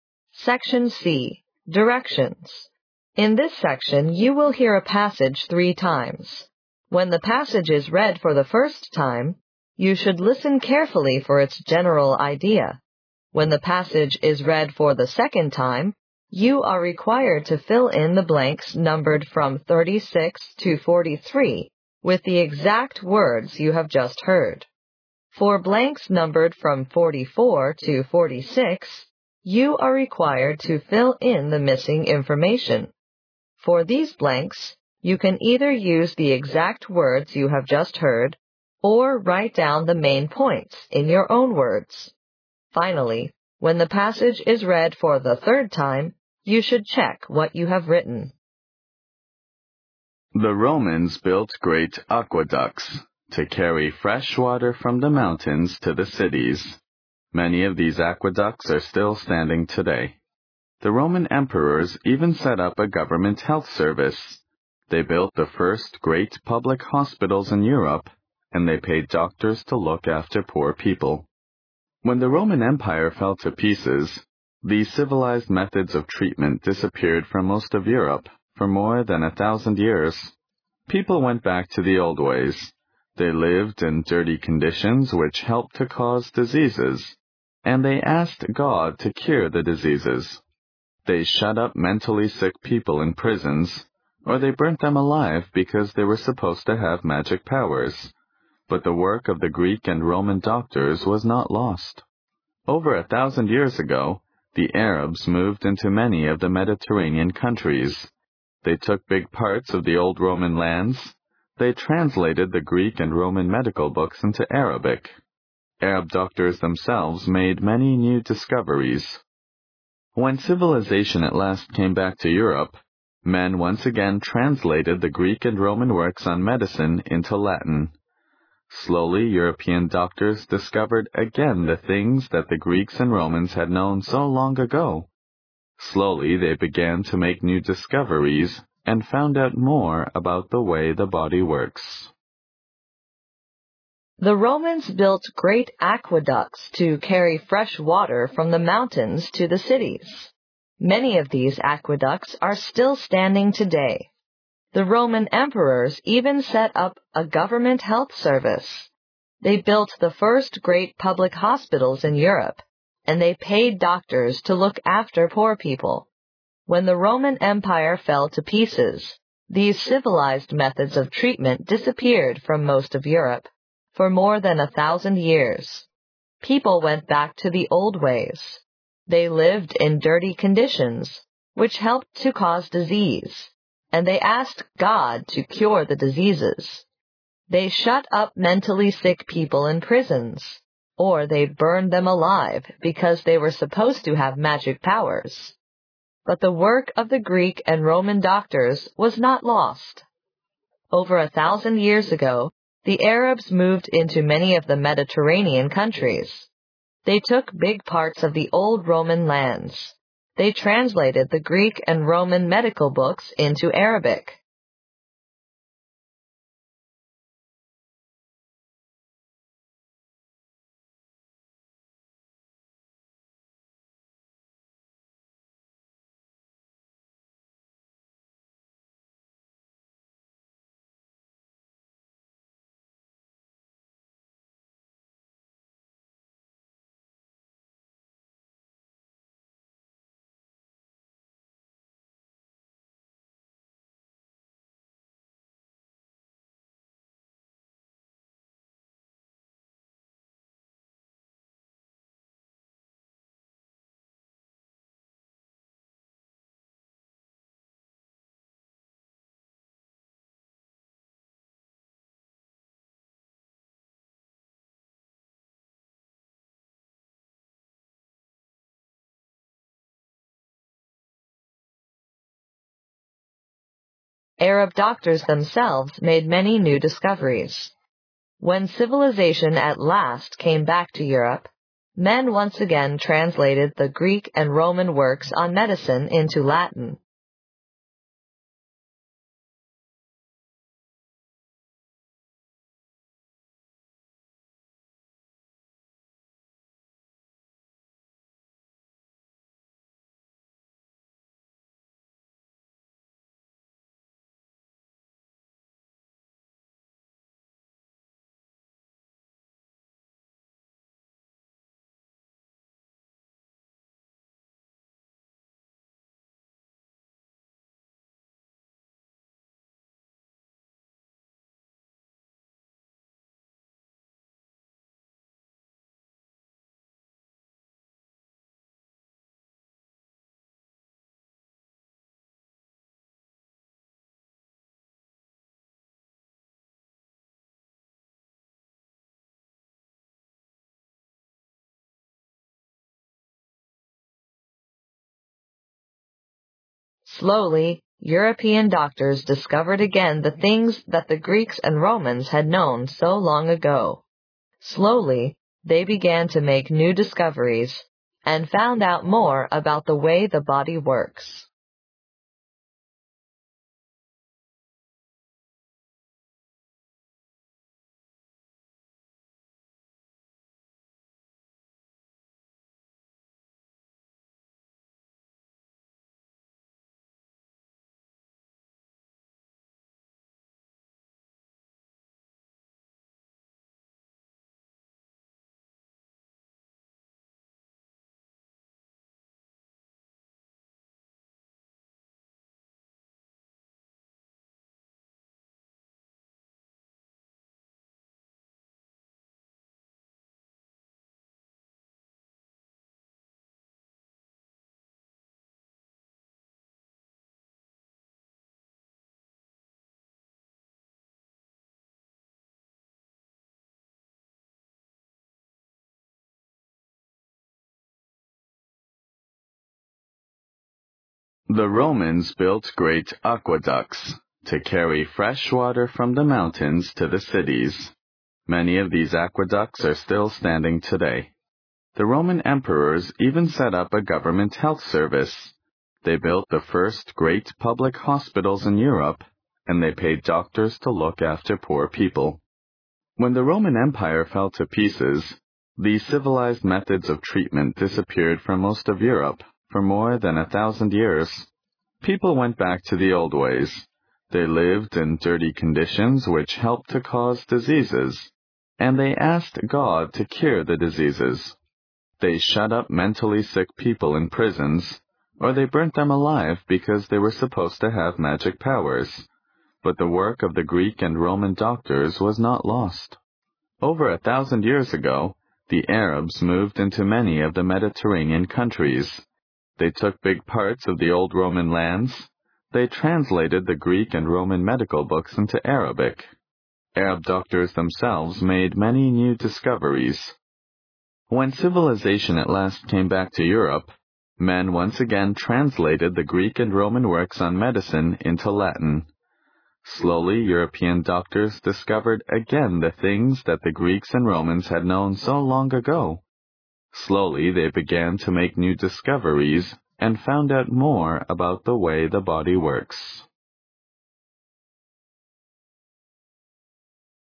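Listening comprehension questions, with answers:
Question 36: The Roman (36) _____even set up a (37)___ health service.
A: emperors

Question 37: The Roman (36) _____even set up a (37)___ health service.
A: government

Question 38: When the Roman Empire fell to pieces, these (38) _____ methods of treatment (39) _____ from most of Europe, for more than a thousand years.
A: civilized

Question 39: When the Roman Empire fell to pieces, these (38) _____ methods of treatment (39) _____ from most of Europe, for more than a thousand years.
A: disappeared

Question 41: They shut up (41) _____ sick people in prisons.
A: mentally

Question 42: Or they burnt them alive because they were supposed to have (42) _____ powers.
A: magic

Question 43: They took big parts of the old (43)_____ lands.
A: Roman

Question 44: (44) ______________________________ Arab doctors themselves made many new discoveries.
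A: They translated the Greek and Roman medical books into Arabic.

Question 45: (45)___________________________________________ Slowly, European doctors discovered again the things that the Greeks and Romans had known so long ago.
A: When civilization at last came back to Europe, men once again translated the Greek and Roman works on medicine into Latin.

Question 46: (46) ____________________________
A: Slowly, they began to make new discoveries and found out more about the way the body works.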